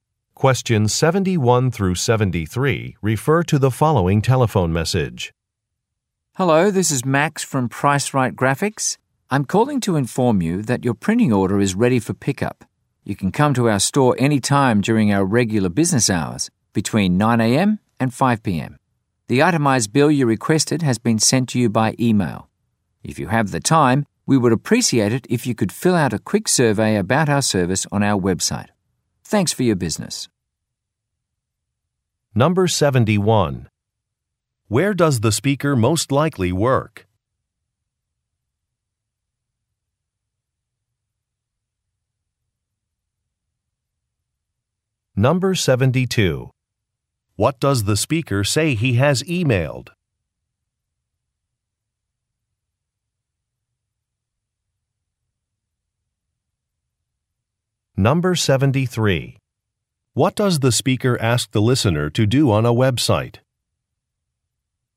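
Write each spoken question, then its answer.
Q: Where does the speaker most likely work?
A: At a printing company

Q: What does the speaker say he has emailed?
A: An itemized bill

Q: What does the speaker ask the listener to do on a website?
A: Fill out a survey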